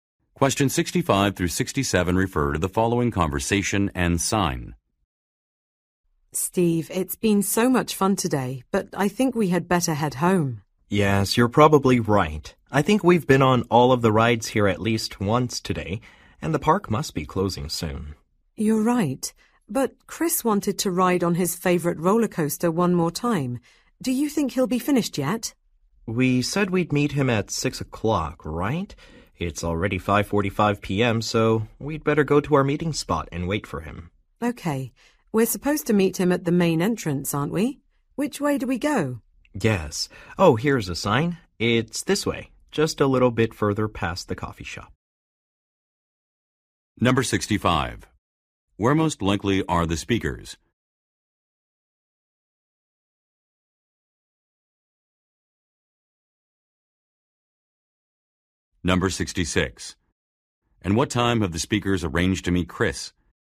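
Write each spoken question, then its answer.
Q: Where most likely are the speakers?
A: At an amusement park

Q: And what time have the speakers arranged to meet Chris?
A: At 6 o'clock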